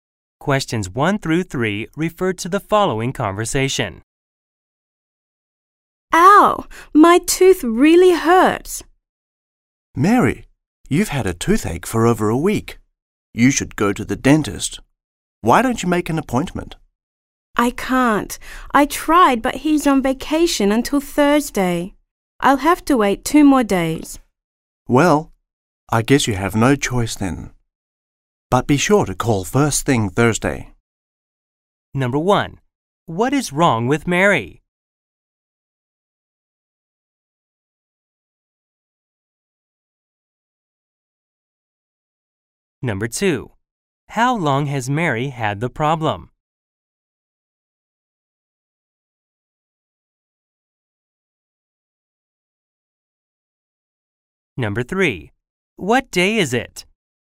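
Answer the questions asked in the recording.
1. She has a toothache.
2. Over a week.
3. Tuesday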